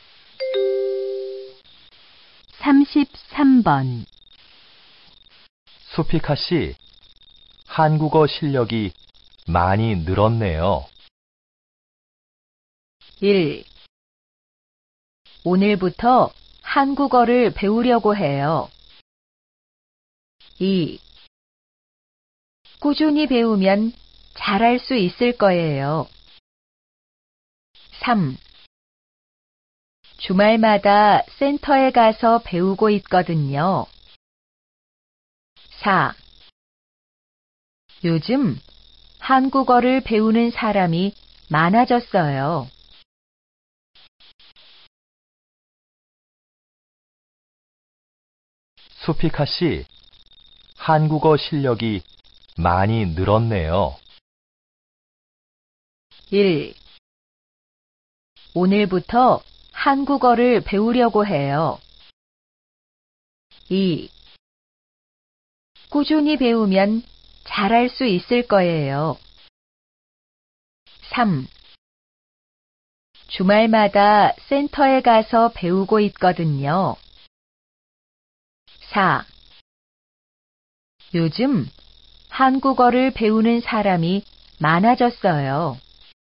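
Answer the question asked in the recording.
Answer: 3: 주말마다 센터에 가서 배우고 있거든요.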